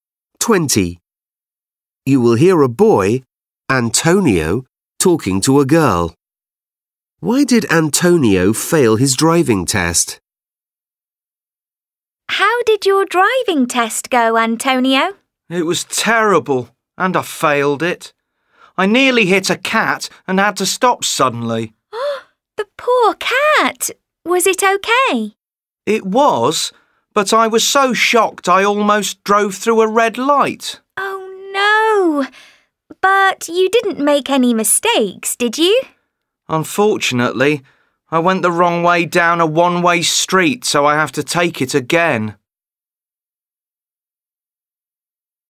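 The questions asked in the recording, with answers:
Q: Why did Antonio fail his driving test?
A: He went the wrong way down a one-way street.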